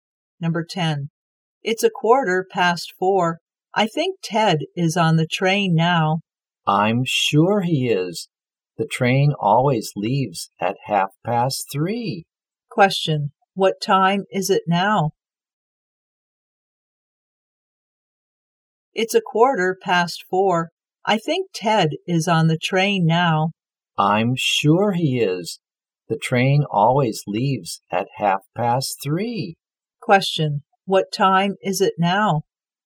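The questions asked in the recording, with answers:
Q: what time is it now?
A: 4:15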